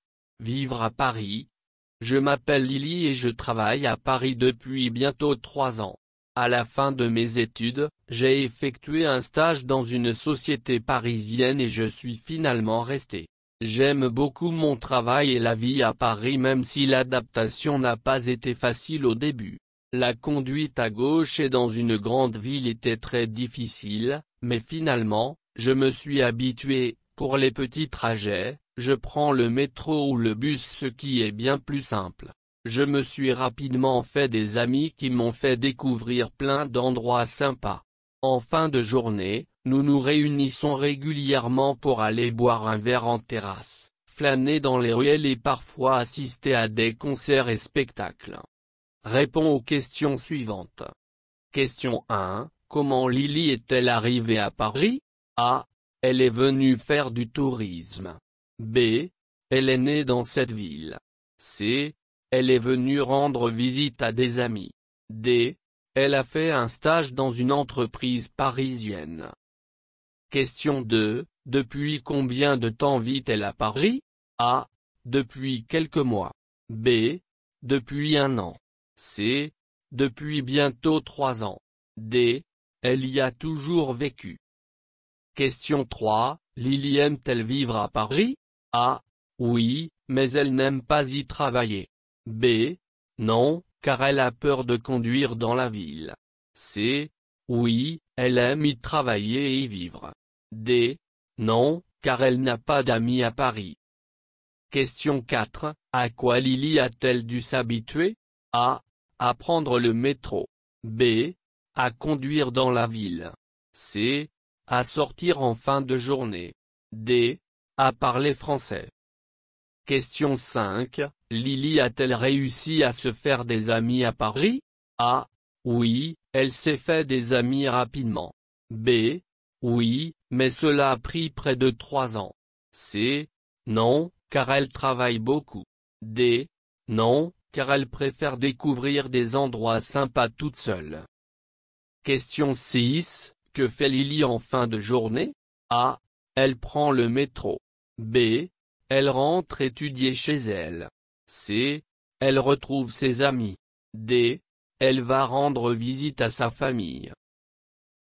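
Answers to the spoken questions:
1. D: Elle a fait un stage dans une entreprise parisienne.
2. C: Depuis bientôt 3 ans.
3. C: Oui, elle aime y travailler et y vivre.
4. B: À conduire dans la ville.
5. A: Oui, elle s'est fait des amis rapidement.
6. C: Elle retrouve ses amis.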